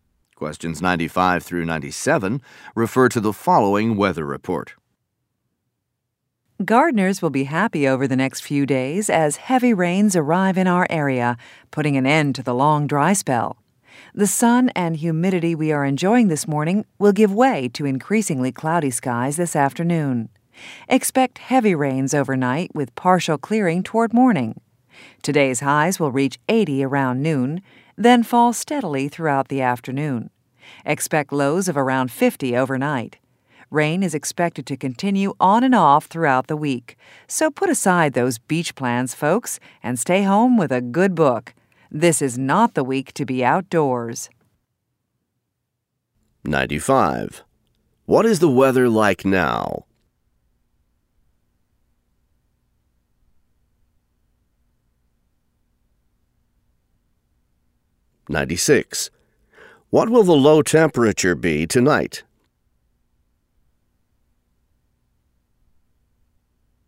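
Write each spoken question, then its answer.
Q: What is the weather like now?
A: Sunny and humid

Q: What will the low temperature be tonight?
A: Around 50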